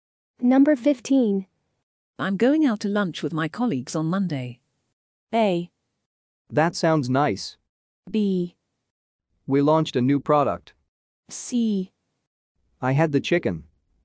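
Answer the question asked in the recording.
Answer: A: That sounds nice.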